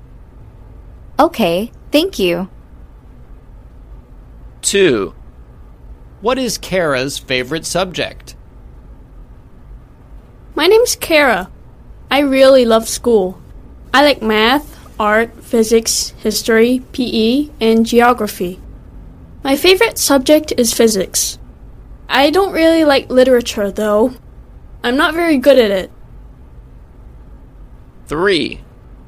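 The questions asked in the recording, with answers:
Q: What is Kara's favorite subject?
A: physics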